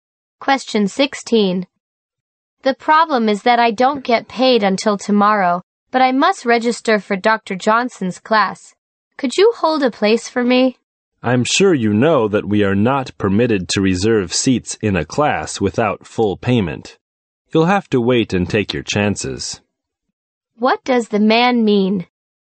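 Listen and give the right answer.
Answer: He can't hold a place without full payment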